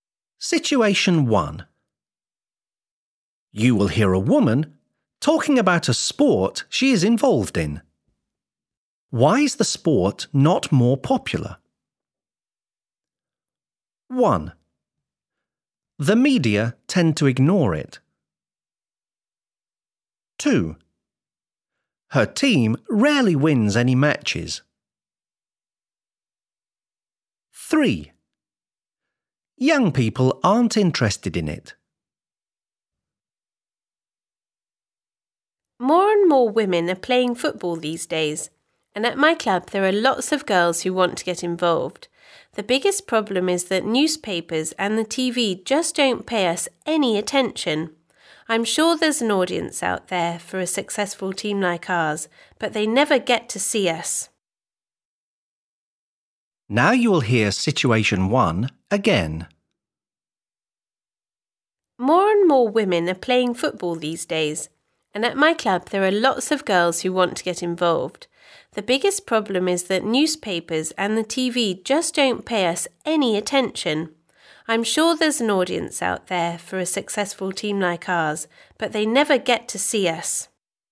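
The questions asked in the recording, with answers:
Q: Why is the sport not more popular?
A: 1: The media tend to ignore it.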